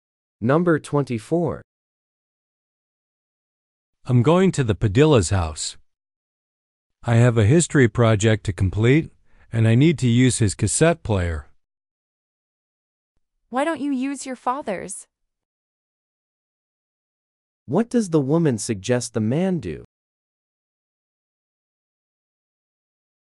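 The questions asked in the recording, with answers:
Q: What does the woman suggest the man do?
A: Use his father's cassette player.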